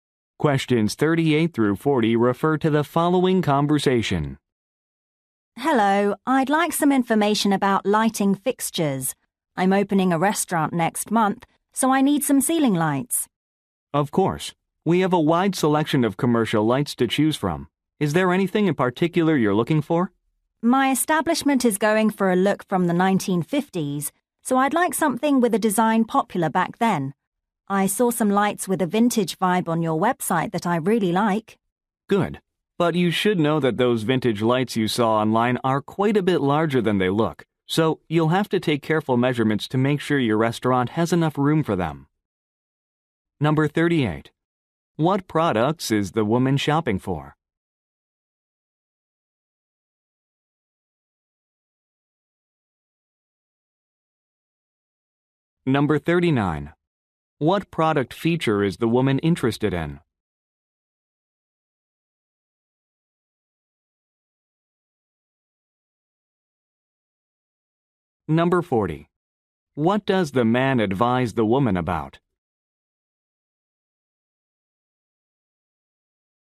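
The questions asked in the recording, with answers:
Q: What products is the woman shopping for?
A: Ceiling lights.

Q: What product feature is the woman interested in?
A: A vintage 1950s design.

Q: What does the man advise the woman about?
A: Taking careful measurements because the lights are larger than they look.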